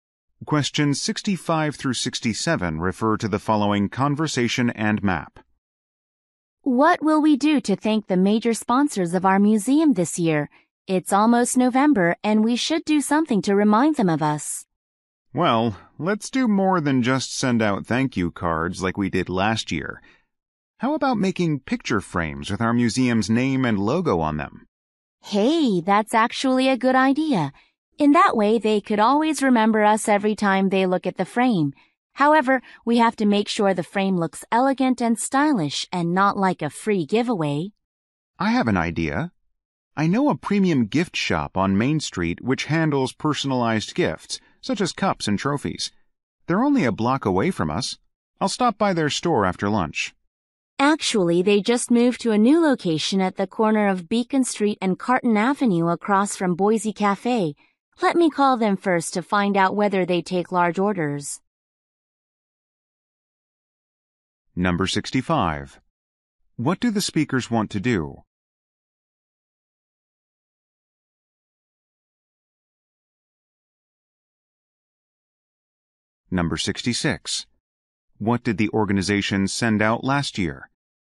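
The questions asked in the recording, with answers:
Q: What do the speakers want to do?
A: Thank the museum's major sponsors

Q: What did the organization send out last year?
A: Thank you cards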